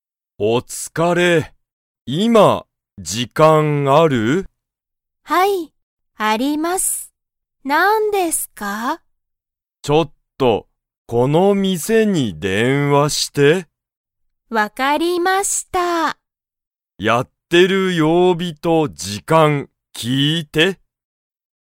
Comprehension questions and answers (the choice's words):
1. 部下ぶかは、今いま、時間じかんが 。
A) ある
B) ない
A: ある

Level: Level 1